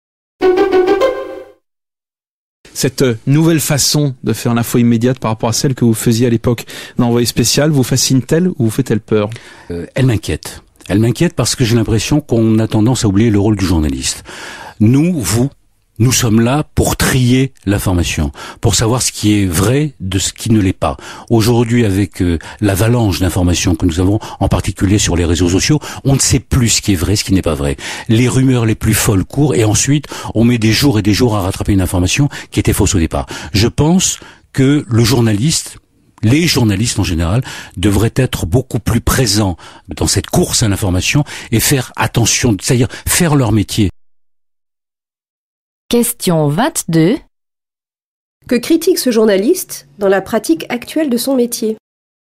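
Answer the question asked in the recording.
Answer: Les journalistes ne trient plus et ne vérifient plus l'information.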